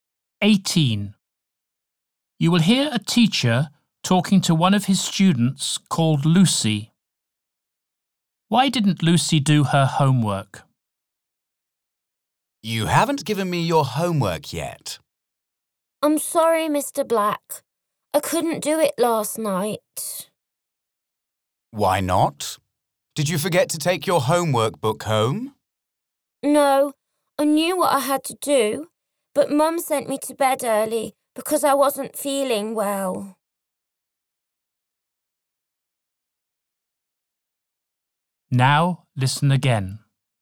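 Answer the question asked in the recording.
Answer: She wasn't feeling well, so her mum sent her to bed early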